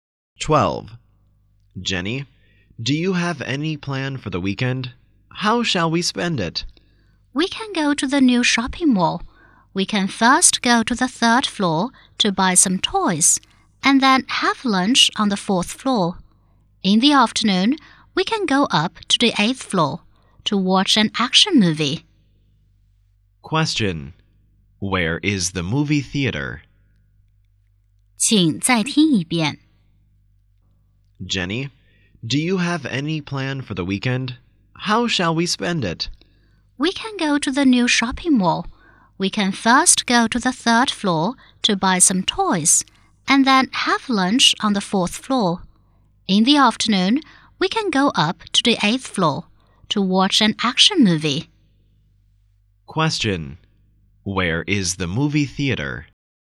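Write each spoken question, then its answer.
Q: Question. Where is the movie theater?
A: On the eighth floor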